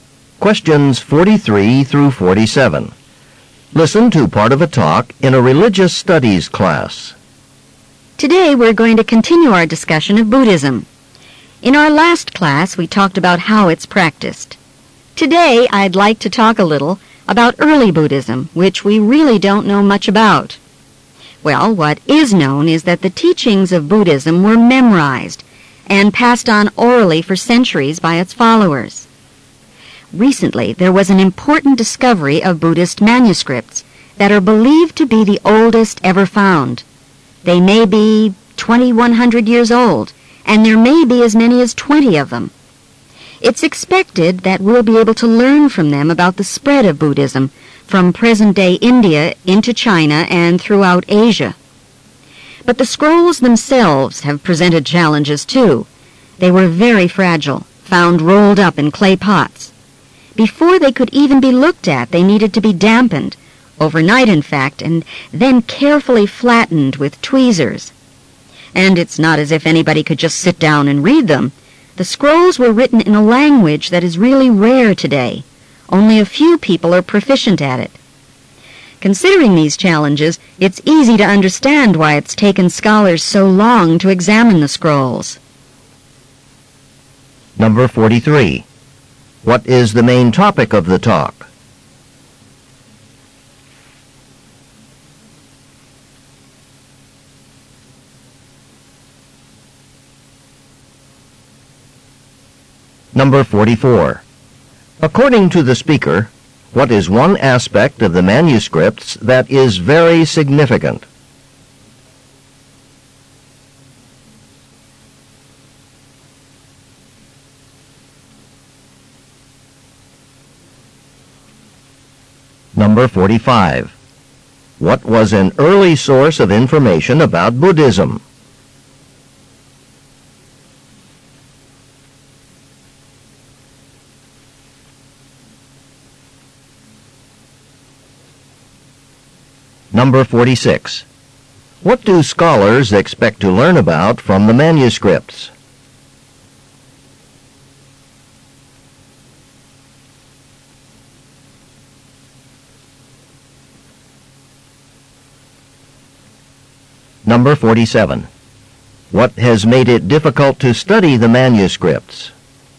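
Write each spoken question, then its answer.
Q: What is the main topic of the talk?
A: Newly found ancient Buddhist manuscripts

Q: According to the speaker, what is one aspect of the manuscripts that is very significant?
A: They are the oldest ever found.

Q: What was an early source of information about Buddhism?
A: Teachings memorized and passed on orally

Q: What do scholars expect to learn about from the manuscripts?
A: The spread of Buddhism from India into China and Asia

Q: What has made it difficult to study the manuscripts?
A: They are fragile and written in a rare language.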